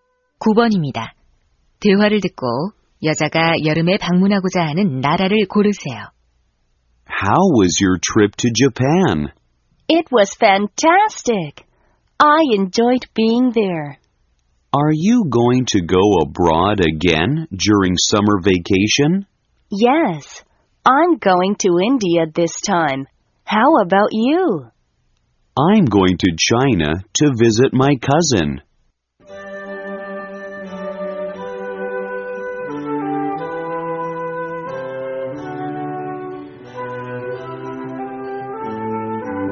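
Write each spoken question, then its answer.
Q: 대화를 듣고 여자가 여름에 방문하고자 하는 나라를 고르세요.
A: 인도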